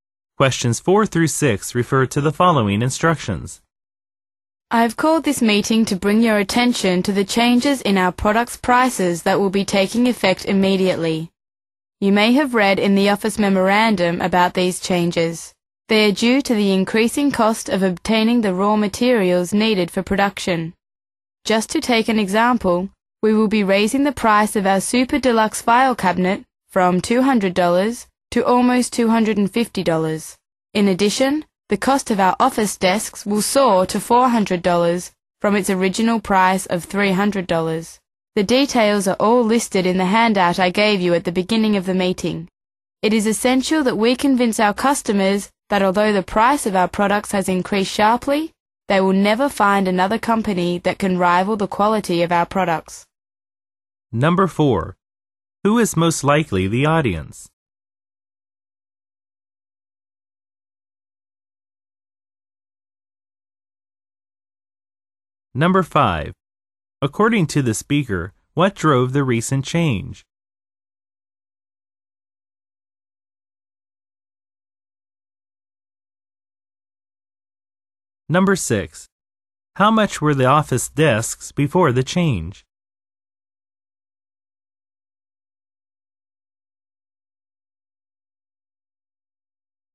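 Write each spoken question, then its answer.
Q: According to the speaker, what drove the recent change?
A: The increasing cost of raw materials

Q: How much were the office desks before the change?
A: $300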